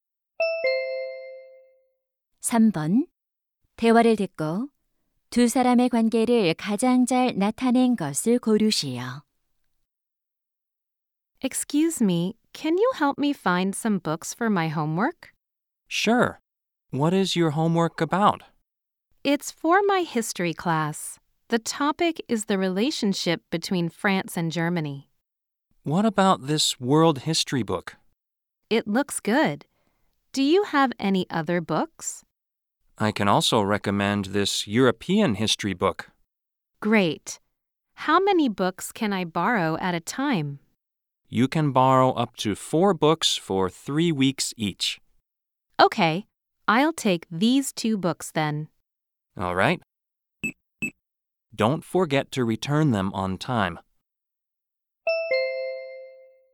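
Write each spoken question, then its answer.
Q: 대화를 듣고 두 사람의 관계를 가장 잘 나타낸 것을 고르시오.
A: 도서관 사서 - 학생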